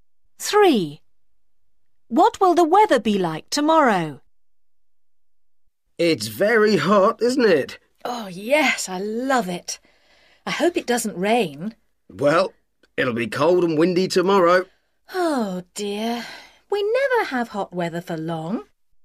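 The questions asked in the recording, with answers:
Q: What will the weather be like tomorrow?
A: Cold and windy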